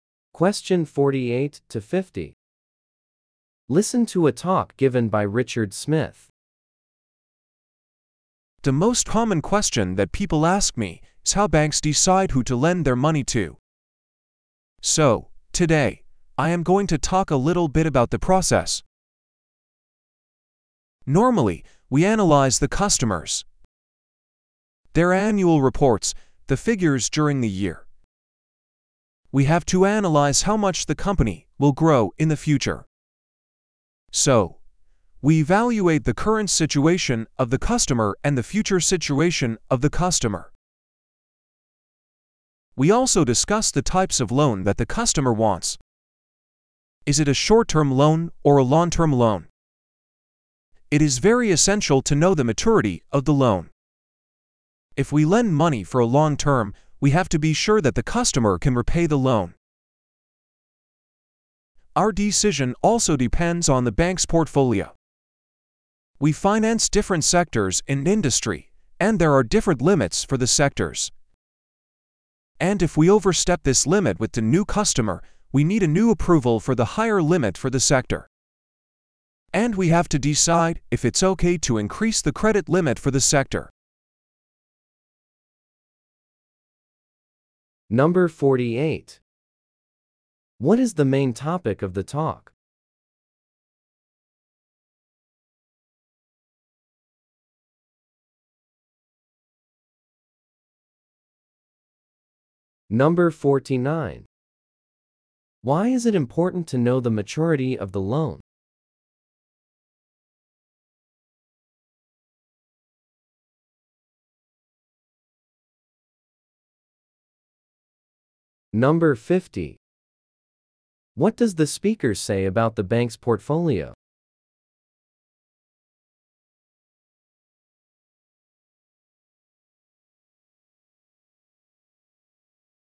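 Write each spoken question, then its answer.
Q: What is the main topic of the talk?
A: How banks decide who to lend money to

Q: Why is it important to know the maturity of the loan?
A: For a long-term loan the bank must be sure the customer can repay

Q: What does the speaker say about the bank's portfolio?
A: There are limits for each sector; exceeding one needs new approval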